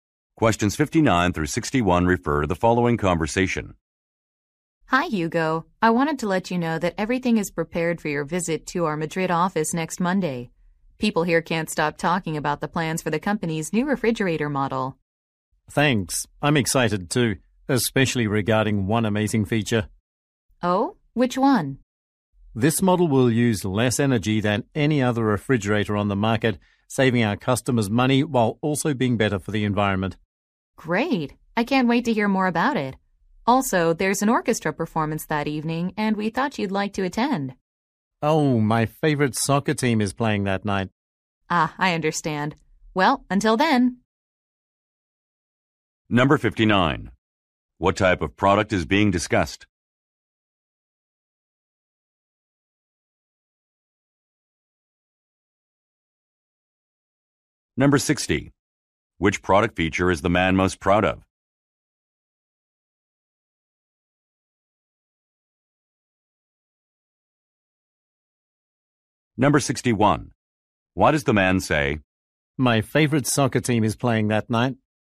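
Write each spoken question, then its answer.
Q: What type of product is being discussed?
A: A refrigerator

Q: Which product feature is the man most proud of?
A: Its low energy use

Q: Why does the man say,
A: To turn down an invitation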